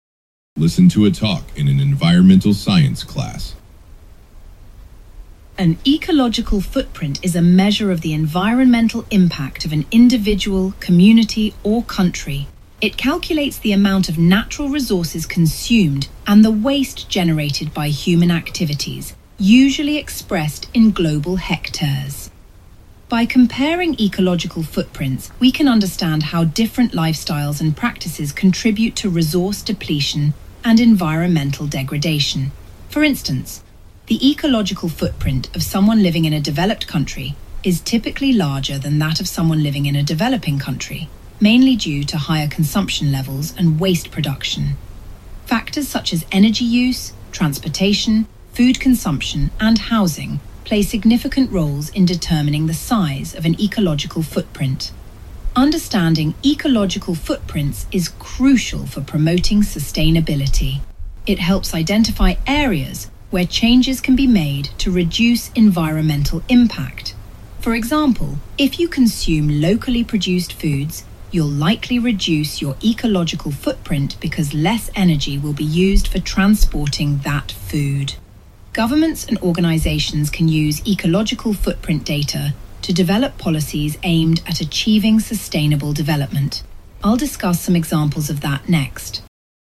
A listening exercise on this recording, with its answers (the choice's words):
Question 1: What is the main topic of the talk?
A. Changes in consumption in societies over time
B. A measure of environmental impact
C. Environmentally damaging activities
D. The role of governments in sustainability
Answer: A measure of environmental impact

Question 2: Why does the speaker mention developed and developing countries?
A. To contradict a theory related to the ecological footprint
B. To show that resource depletion can be similar regardless of lifestyle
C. To illustrate the usefulness of comparing ecological footprints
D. To point out that production efficiency reduces the ecological footprint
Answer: To illustrate the usefulness of comparing ecological footprints

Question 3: What does the speaker mention as a way that people can reduce their ecological footprint?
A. By disposing of waste appropriately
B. By joining an environmental organization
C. By using environmentally friendly forms of transportation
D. By eating locally produced food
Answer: By eating locally produced food

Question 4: What will the speaker most likely discuss next?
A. How information about ecological footprints has been used in creating policies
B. How data about ecological footprints has been collected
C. Why the idea of ecological footprint is often misunderstood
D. Why sustainable development can be difficult to achieve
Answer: How information about ecological footprints has been used in creating policies

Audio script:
Listen to a talk in an environmental science class.
Professor: An ecological footprint is a measure of the environmental impact of an individual, community, or country. It calculates the amount of natural resources consumed and the waste generated by human activities, usually expressed in global hectares. By comparing ecological footprints, we can understand how different lifestyles and practices contribute to resource depletion and environmental degradation. For instance, the ecological footprint of someone living in a developed country is typically larger than that of someone living in a developing country, mainly due to higher consumption levels and waste production. Factors such as energy use, transportation, food consumption, and housing play significant roles in determining the size of an ecological footprint. Understanding ecological footprints is crucial for promoting sustainability. It helps identify areas where changes can be made to reduce environmental impact. For example, if you consume locally produced foods, you'll likely reduce your ecological footprint because less energy will be used for transporting that food. Governments and organizations can use ecological footprint data to develop policies aimed at achieving sustainable development. I'll discuss some examples of that next.